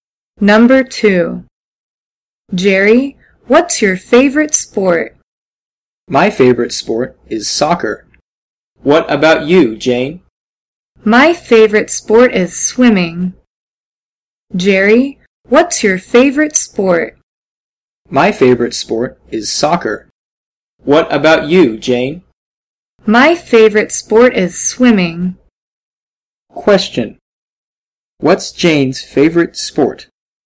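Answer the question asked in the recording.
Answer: Swimming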